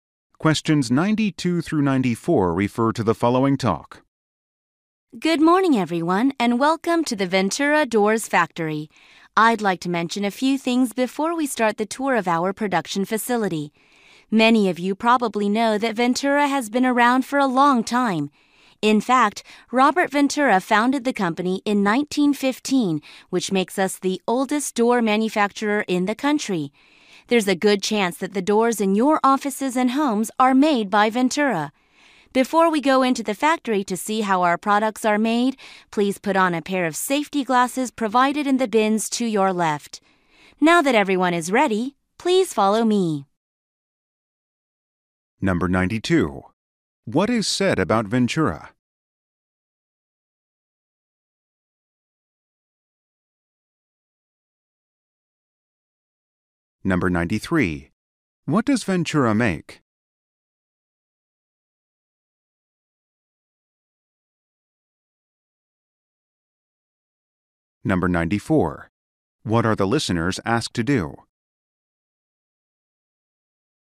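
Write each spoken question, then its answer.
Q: What is said about Ventura?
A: It is the oldest door manufacturer in the country

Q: What does Ventura make?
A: Doors

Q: What are the listeners asked to do?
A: Put on safety glasses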